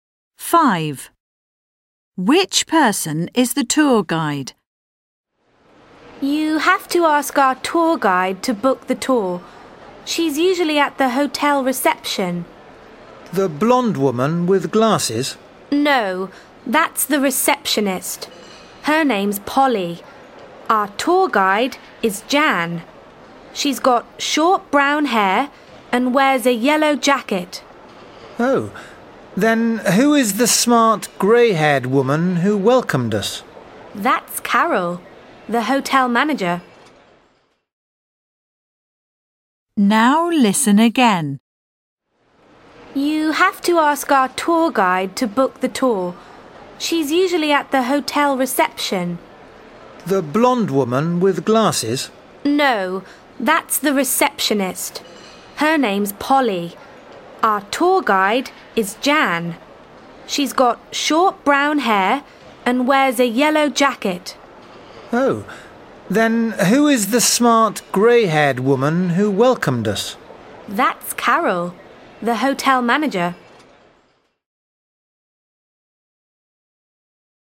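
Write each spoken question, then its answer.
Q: Which person is the tour guide?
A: Jan, with short brown hair and a yellow jacket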